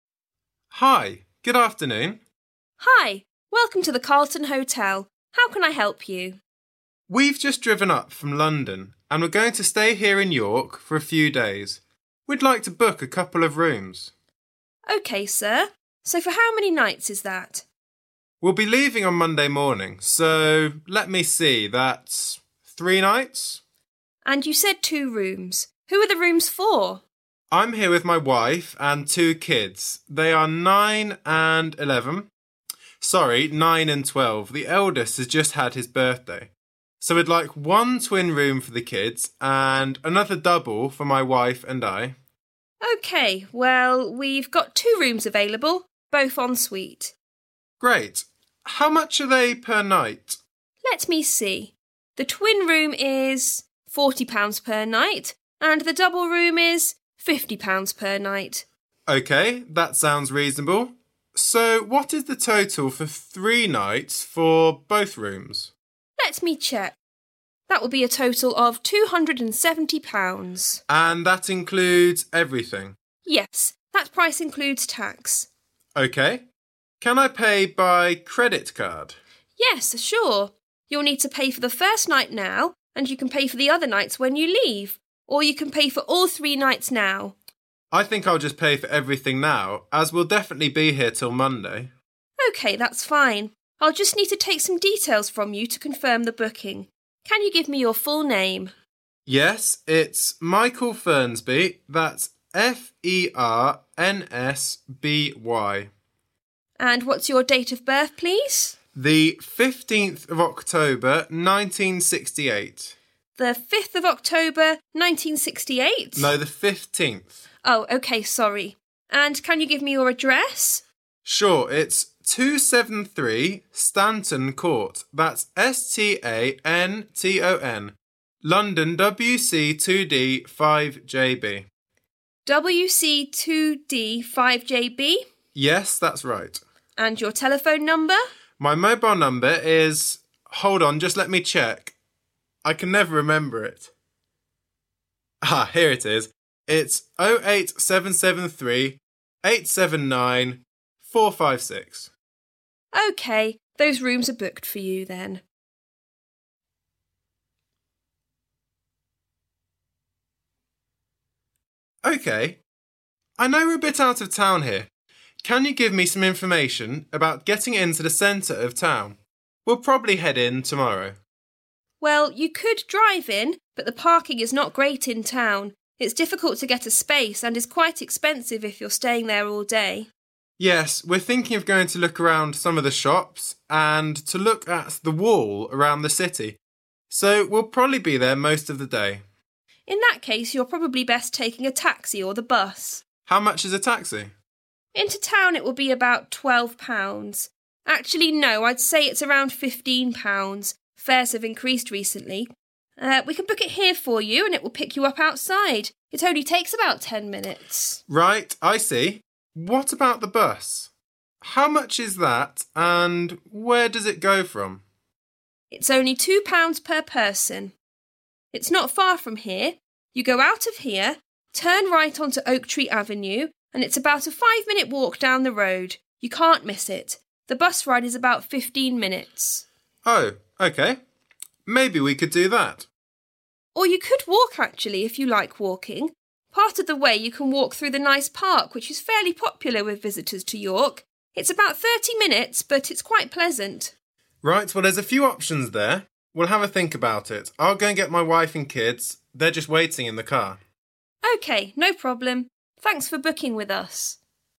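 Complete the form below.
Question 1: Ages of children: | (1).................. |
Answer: 9 and 12

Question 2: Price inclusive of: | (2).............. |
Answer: tax

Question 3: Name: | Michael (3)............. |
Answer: Fernsby

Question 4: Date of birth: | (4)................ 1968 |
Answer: 15th October

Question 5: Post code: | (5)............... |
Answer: WC2D5JB

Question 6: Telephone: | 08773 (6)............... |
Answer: 879456

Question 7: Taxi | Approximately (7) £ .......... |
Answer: 15

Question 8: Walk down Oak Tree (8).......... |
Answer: Avenue

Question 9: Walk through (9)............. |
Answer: the park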